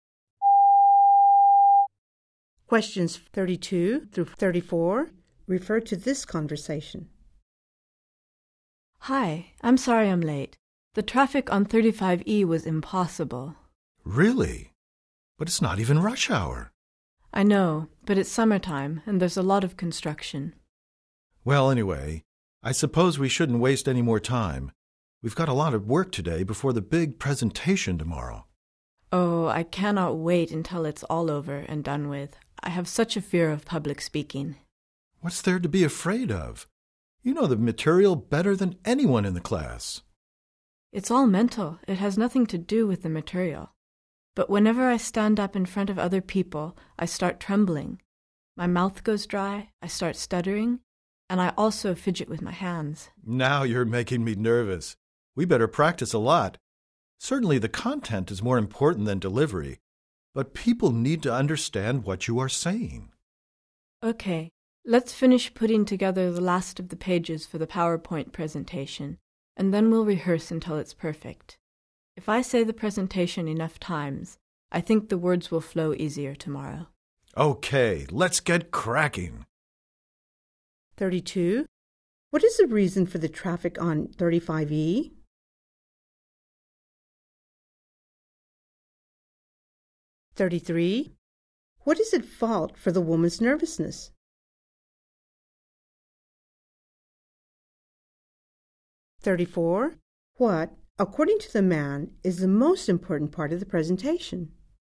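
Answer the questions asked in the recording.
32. Summer construction
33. Her fear of public speaking (it's mental)
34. The content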